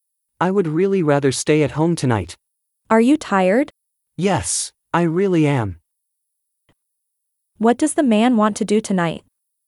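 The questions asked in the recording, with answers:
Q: What does the man want to do tonight?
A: Stay at home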